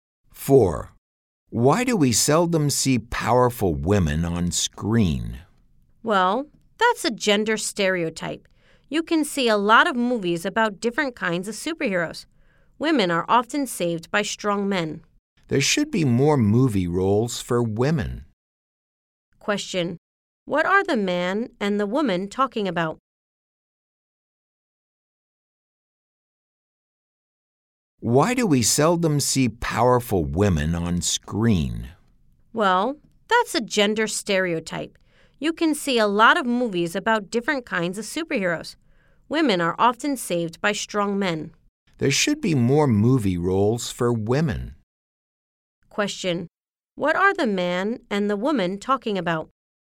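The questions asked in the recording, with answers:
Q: What are the man and the woman talking about?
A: Gender stereotypes about women in movies.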